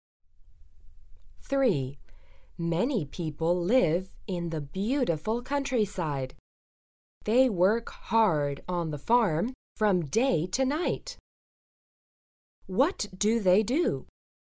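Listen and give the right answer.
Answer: They are farmers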